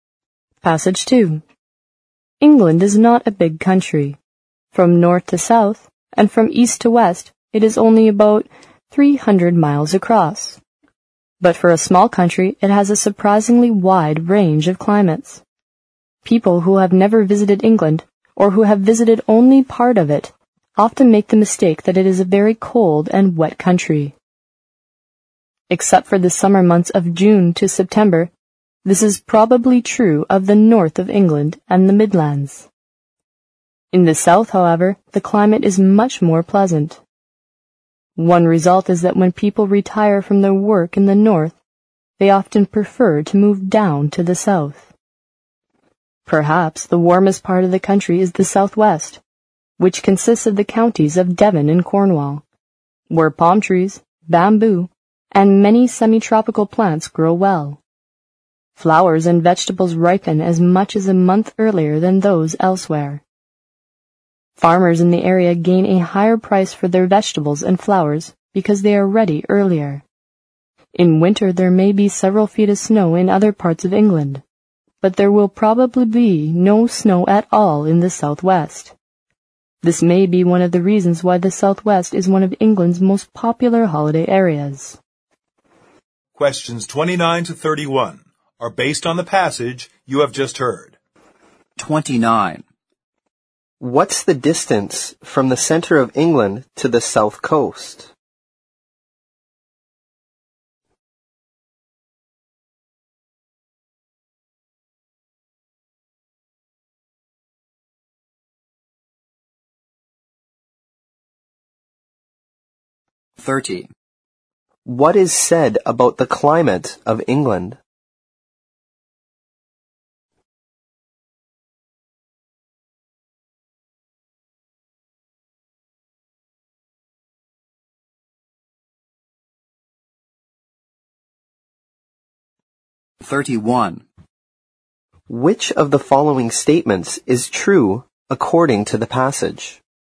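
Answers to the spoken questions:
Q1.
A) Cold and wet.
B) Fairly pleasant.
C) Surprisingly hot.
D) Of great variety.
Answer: D) Of great variety.
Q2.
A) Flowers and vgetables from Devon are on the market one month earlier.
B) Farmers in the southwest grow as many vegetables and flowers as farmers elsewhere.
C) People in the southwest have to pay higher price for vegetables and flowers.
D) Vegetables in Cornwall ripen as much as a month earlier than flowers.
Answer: A) Flowers and vgetables from Devon are on the market one month earlier.
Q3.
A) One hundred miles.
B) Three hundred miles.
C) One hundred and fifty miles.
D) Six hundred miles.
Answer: C) One hundred and fifty miles.

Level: 新编四级听力练习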